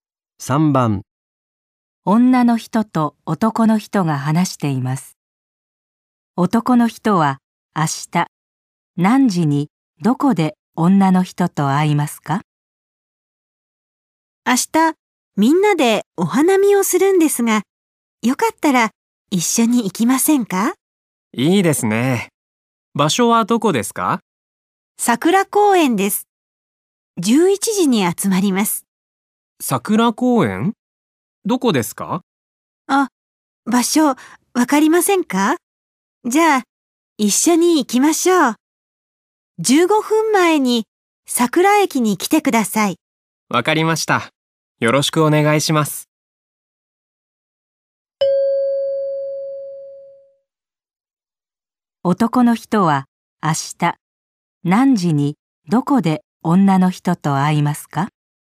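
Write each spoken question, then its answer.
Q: 男の人は明日何時にどこで女の人と会いますか?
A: 10時45分に桜駅で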